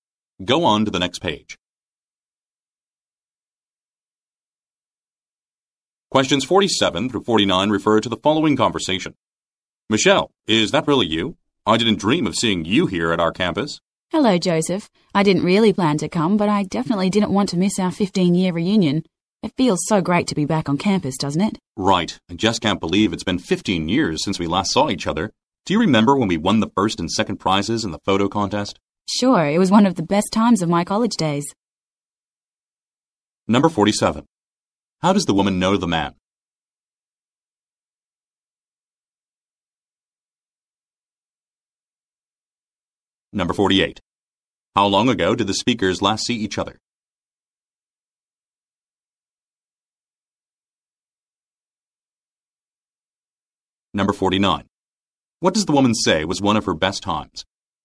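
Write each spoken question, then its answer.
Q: How does the woman know the man?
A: They went to college together

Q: How long ago did the speakers last see each other?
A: 15 years ago

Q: What does the woman say was one of her best times?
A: Winning prizes in the photo contest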